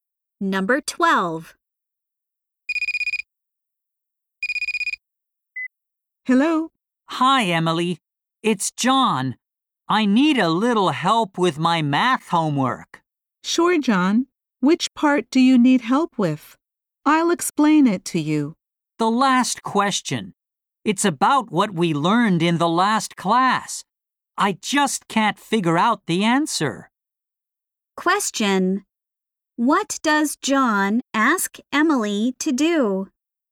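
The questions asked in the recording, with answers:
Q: What does John ask Emily to do?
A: Help him with the last math homework question.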